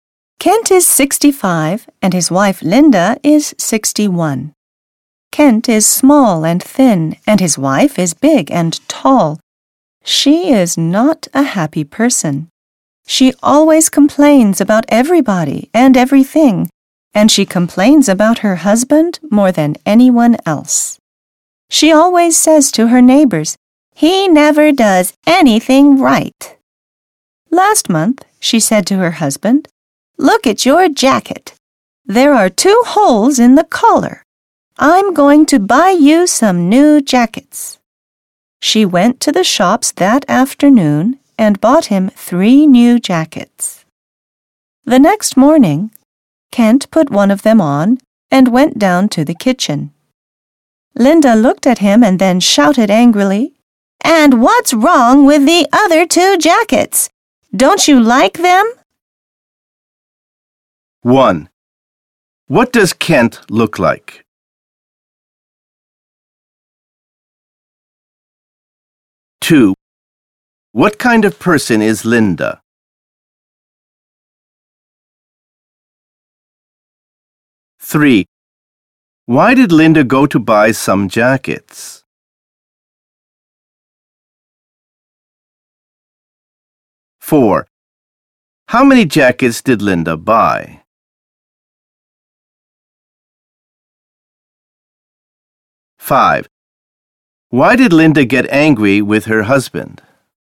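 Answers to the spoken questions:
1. Small and thin
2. An unhappy person who always complains
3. His jacket had two holes in the collar
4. Three
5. He wore only one of the new jackets, so she thought he didn't like the other two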